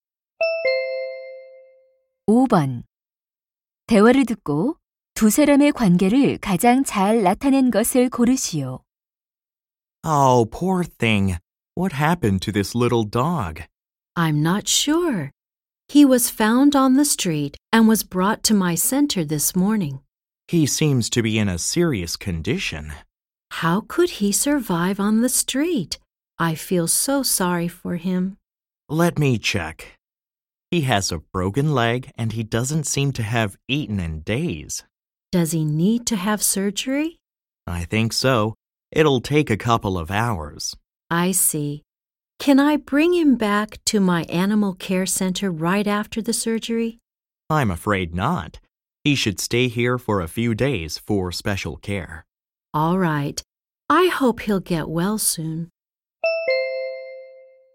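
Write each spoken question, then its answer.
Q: 대화를 듣고 두 사람의 관계를 가장 잘 나타낸 것을 고르시오.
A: 동물 보호소 직원 - 수의사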